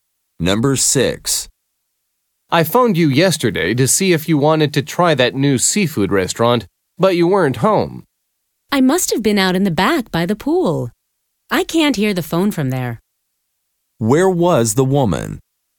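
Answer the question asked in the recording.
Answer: Out back by the pool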